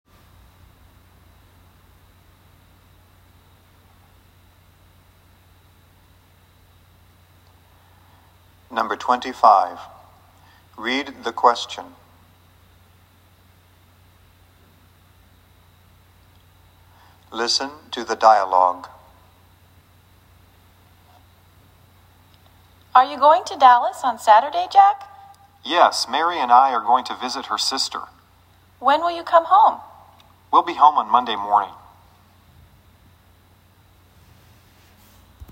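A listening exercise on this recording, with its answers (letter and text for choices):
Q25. Who is going with Jack to Dallas?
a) her sister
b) Jane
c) his sister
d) Mary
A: d) Mary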